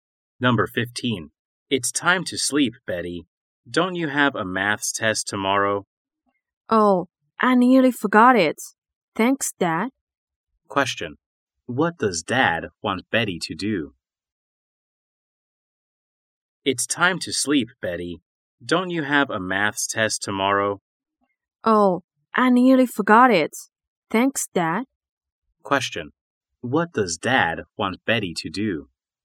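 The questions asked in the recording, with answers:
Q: What does Dad want Betty to do?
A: Go to sleep.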